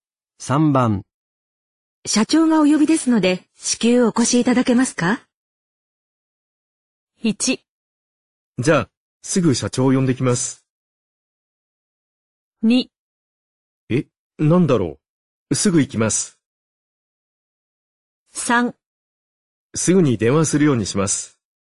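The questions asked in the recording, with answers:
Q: 社長がお呼びですので、至急お越しいただけますか?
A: 2: え、なんだろう。すぐ行きます。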